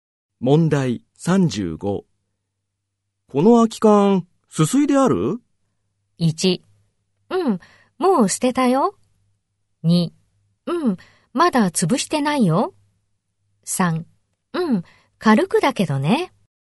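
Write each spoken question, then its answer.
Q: この空き缶、すすいである?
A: 3: うん、軽くだけどね。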